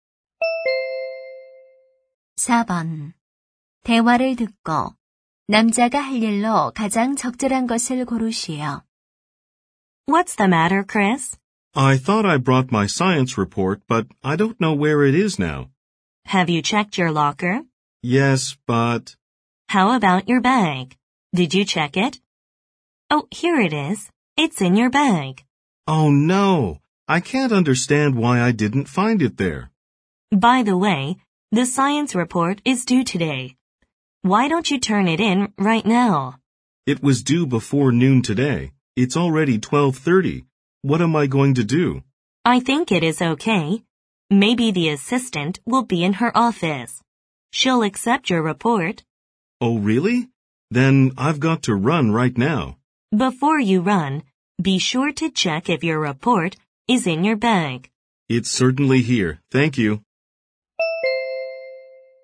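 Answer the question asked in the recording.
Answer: 과학 보고서를 조교에게 제출하러 간다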